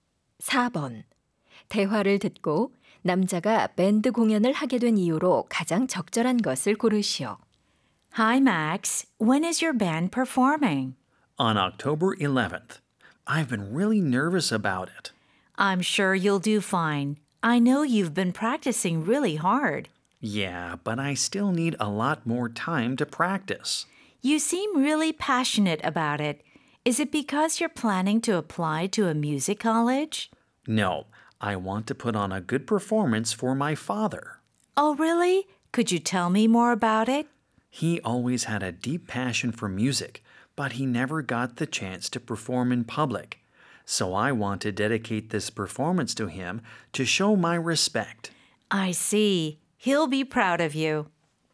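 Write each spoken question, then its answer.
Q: 대화를 듣고 남자가 밴드 공연을 하게 된 이유로 가장 적절한 것을 고르시오.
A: 아버지께 공연을 바쳐 존경을 표하기 위해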